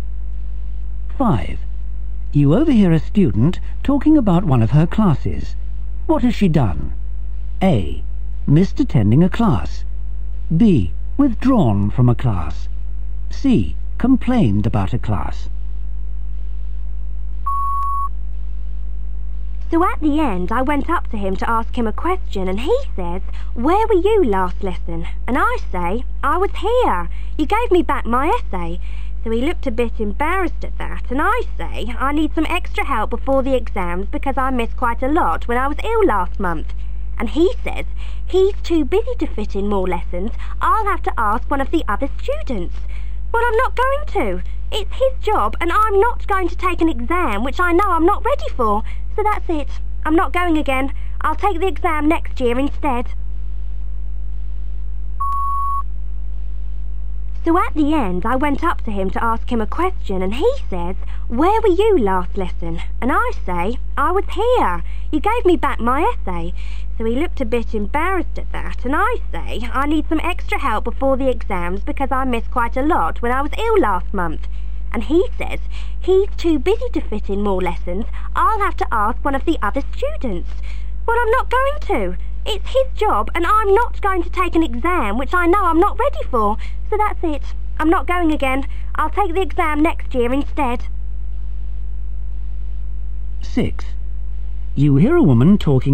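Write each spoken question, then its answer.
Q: What has she done?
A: B: Withdrawn from a class.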